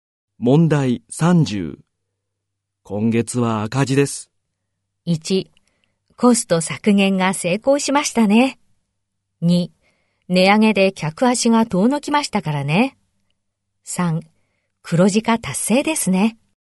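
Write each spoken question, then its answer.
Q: 今月は赤字です。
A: 2: 値上げで客足が遠のきましたからね。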